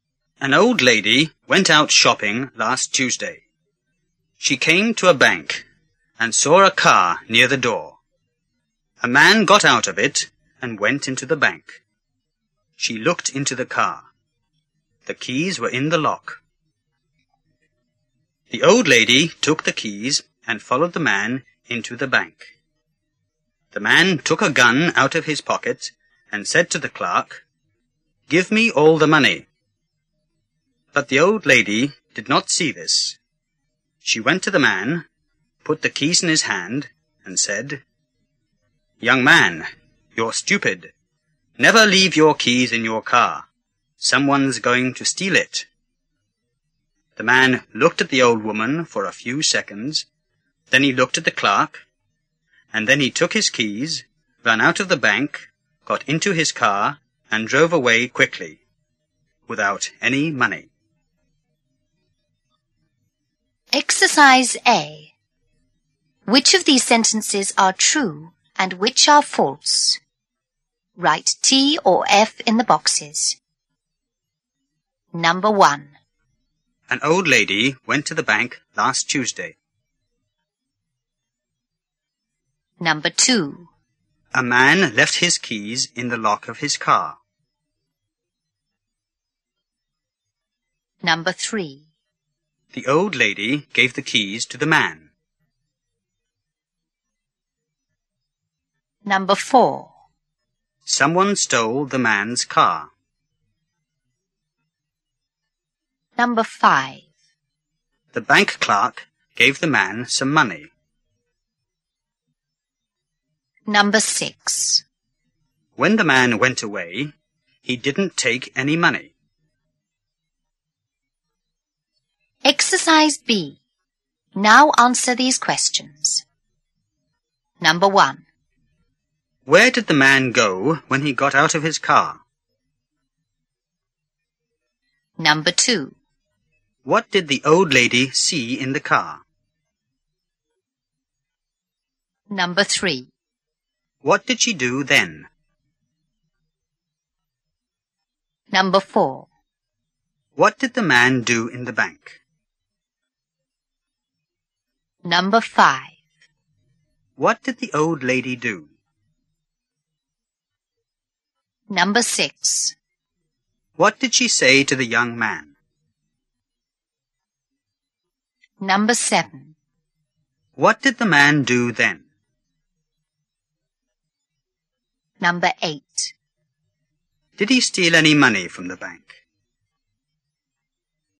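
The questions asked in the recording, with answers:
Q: A man left his keys in the lock of his car.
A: True

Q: The old lady gave the keys to the man.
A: True

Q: Someone stole the man's car.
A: False

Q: The bank clerk gave the man some money.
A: False

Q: When the man went away, he didn't take any money.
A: True

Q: Where did the man go when he got out of his car?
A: Into the bank

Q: What did the old lady see in the car?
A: The keys in the lock

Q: What did she do then?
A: She took the keys and followed the man into the bank

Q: What did the man do in the bank?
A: He took out a gun and told the clerk to give him all the money

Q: What did the old lady do?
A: She went to the man and put the keys in his hand

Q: What did she say to the young man?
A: Young man, you're stupid. Never leave your keys in your car. Someone's going to steal it.

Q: What did the man do then?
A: He took his keys, ran out of the bank and drove away quickly

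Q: Did he steal any money from the bank?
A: No, he didn't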